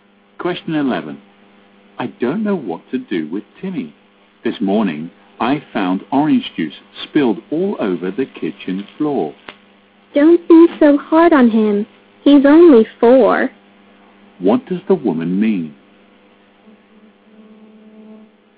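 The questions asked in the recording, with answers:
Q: What does the woman mean?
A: The man shouldn't be so hard on Timmy because he's only four.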